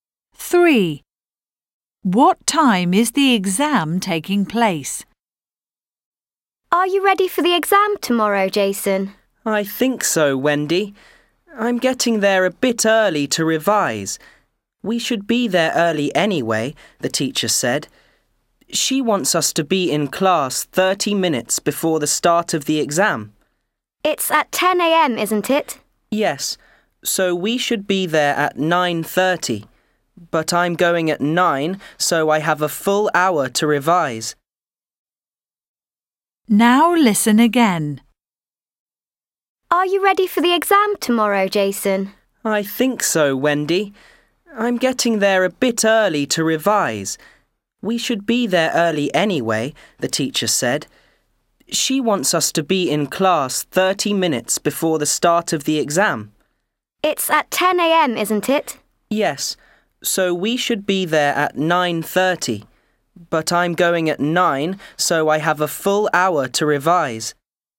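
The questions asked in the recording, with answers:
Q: What time is the exam taking place?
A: 10 a.m.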